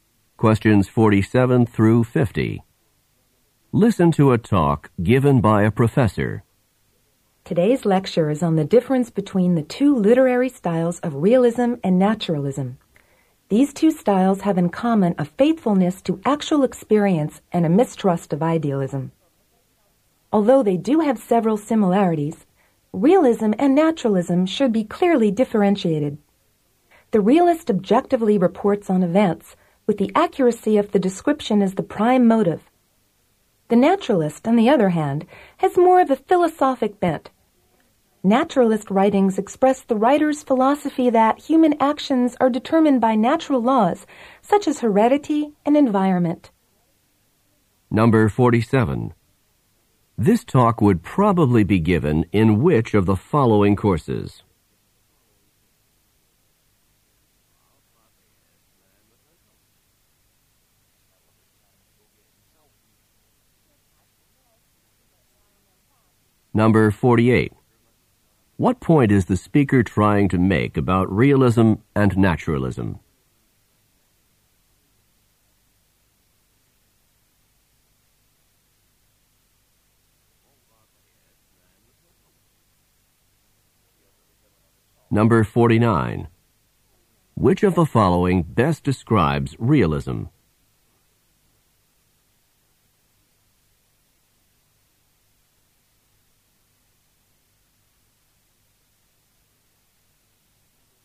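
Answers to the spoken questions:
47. A literature course
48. They have similarities but should be clearly differentiated
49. Objective, accurate reporting of events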